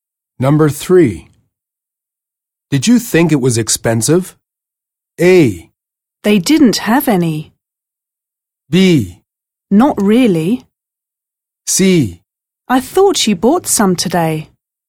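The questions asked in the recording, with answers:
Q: Did you think it was expensive?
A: B: Not really.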